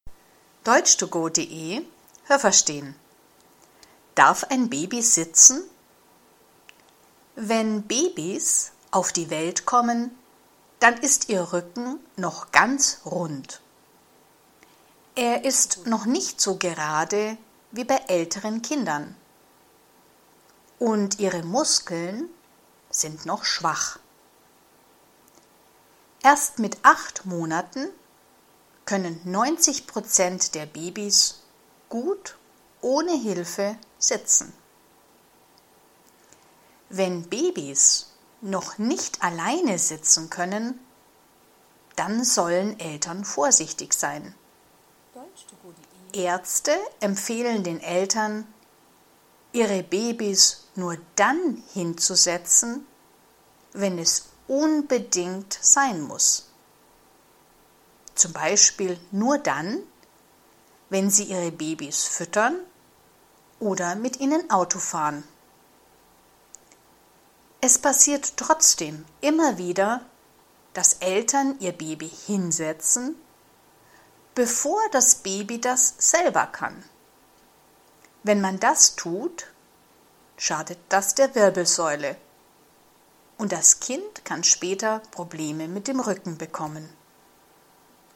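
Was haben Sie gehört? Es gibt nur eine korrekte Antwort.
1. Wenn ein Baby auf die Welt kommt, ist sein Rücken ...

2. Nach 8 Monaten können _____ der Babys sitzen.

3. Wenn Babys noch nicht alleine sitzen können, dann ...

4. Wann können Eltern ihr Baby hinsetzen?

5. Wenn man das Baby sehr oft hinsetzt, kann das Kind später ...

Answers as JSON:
{"1": "noch ganz rund", "2": "90%", "3": "sollen Eltern vorsichtig sein", "4": "Nur wenn es unbedingt sein muss, z. B. beim Füttern oder Autofahren", "5": "Probleme mit dem Rücken bekommen"}

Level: A (einfach)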